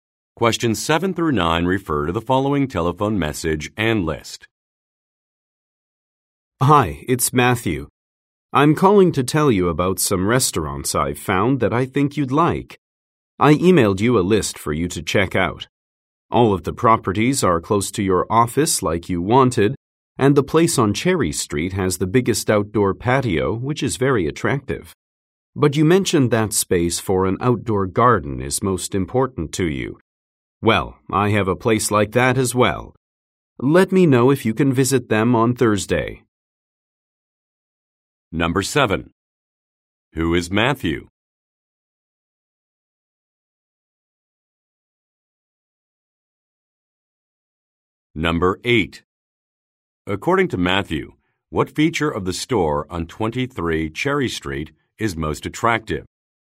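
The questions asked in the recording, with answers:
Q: According to Matthew, what feature of the store on 23 Cherry Street is most attractive?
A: Its big outdoor patio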